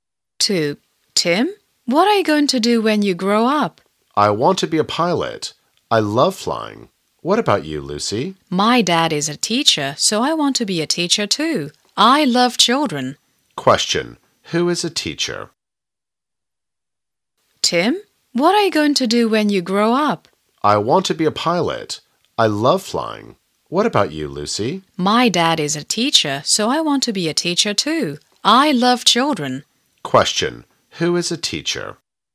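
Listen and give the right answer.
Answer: Lucy's dad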